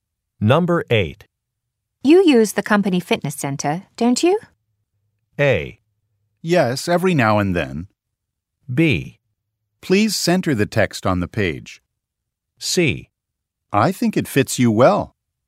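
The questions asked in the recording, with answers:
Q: You use the company fitness center, don't you?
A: A: Yes, every now and then.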